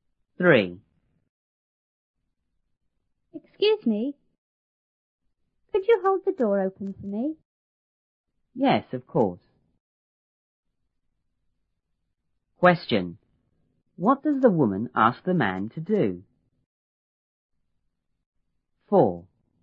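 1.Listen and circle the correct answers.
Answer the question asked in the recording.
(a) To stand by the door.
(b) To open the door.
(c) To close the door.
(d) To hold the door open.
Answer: (d) To hold the door open.

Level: 初中英语广州版1B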